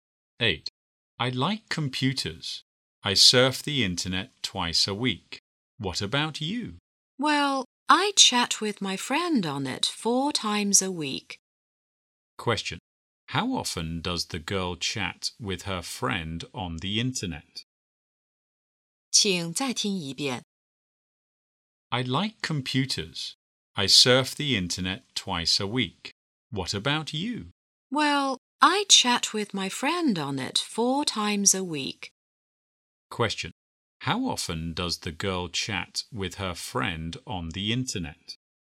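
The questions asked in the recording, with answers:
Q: How often does the girl chat with her friend on the internet?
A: Four times a week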